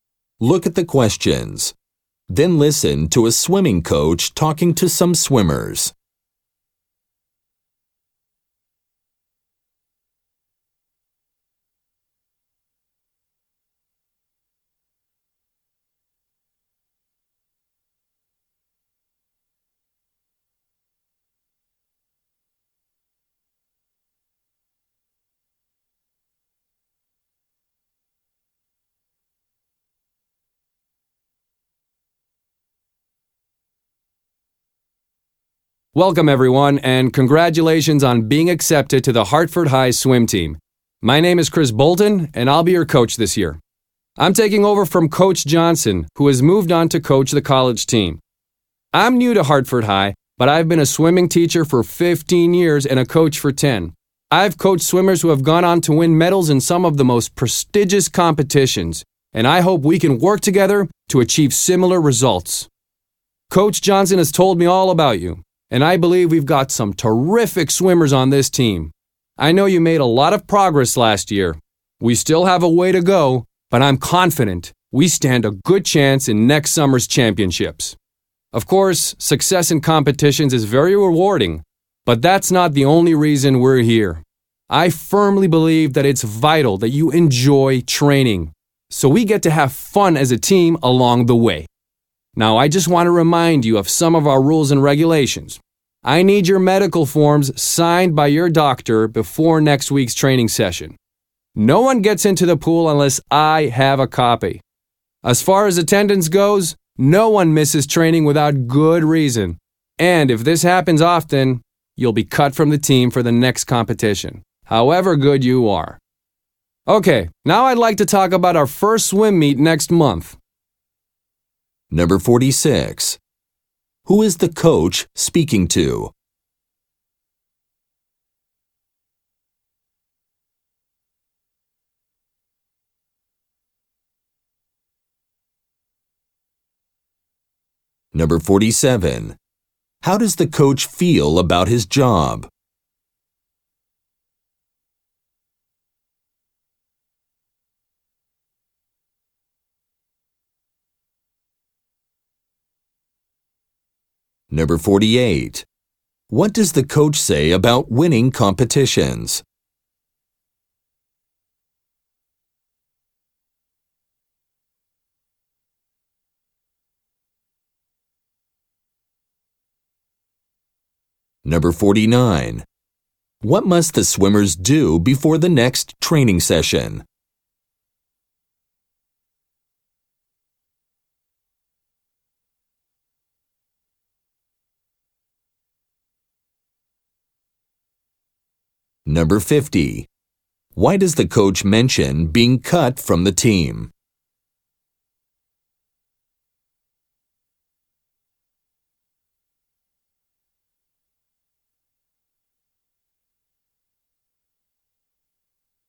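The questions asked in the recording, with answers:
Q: Who is the coach speaking to?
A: New members of the Hartford High swim team

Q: What does the coach say about winning competitions?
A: It is rewarding, but enjoying training matters too

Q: What must the swimmers do before the next training session?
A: Hand in medical forms signed by a doctor

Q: Why does the coach mention being cut from the team?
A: To warn against missing training often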